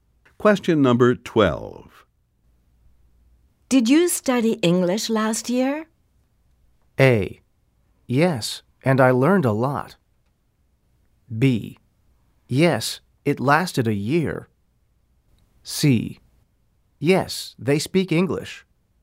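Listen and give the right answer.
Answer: A: Yes, and I learned a lot.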